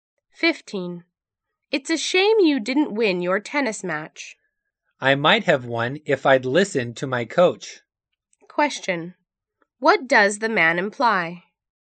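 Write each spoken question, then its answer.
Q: What does the man imply?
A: He didn't follow his coach's advice.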